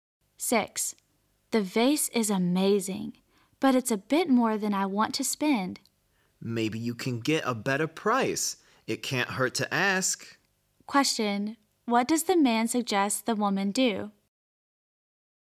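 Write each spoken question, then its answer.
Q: What does the man suggest the woman do?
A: Ask for a lower price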